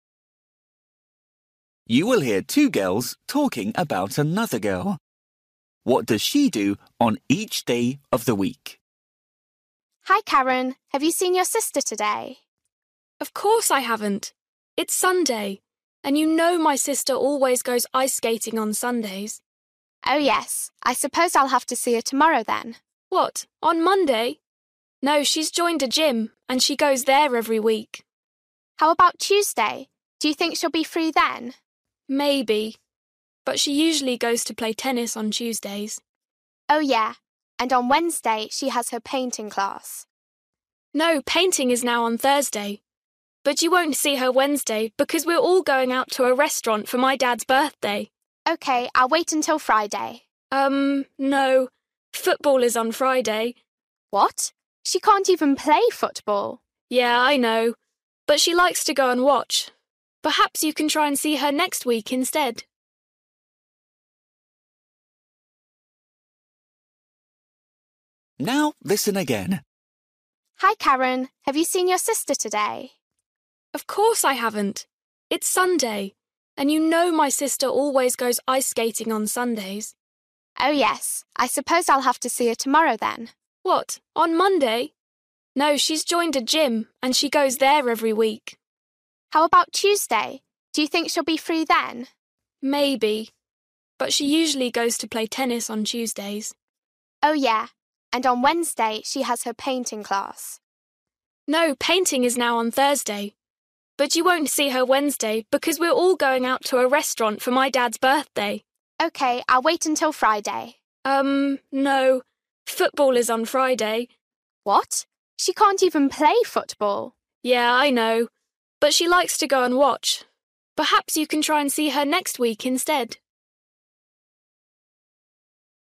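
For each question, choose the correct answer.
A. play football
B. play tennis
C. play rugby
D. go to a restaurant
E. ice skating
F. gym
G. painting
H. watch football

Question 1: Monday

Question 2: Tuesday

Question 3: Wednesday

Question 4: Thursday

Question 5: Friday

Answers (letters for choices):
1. F
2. B
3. D
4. G
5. H

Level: Luyện nghe trình độ A2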